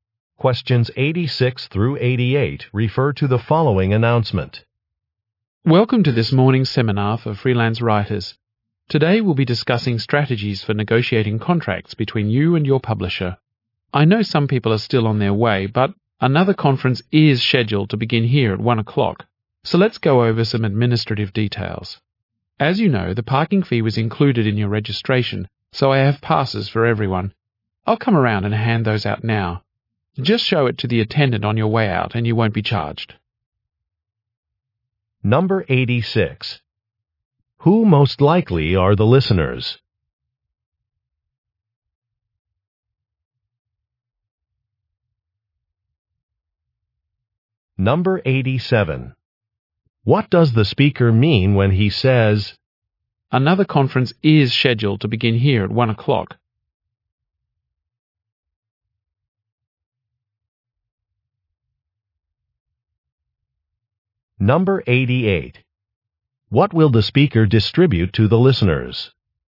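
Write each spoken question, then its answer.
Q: Who most likely are the listeners?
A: Freelance writers

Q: What will the speaker distribute to the listeners?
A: Parking passes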